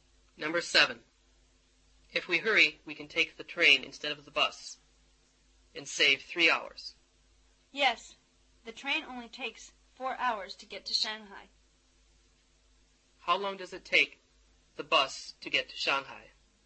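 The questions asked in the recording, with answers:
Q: How long does it take the bus to get to Shanghai?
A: 7 hours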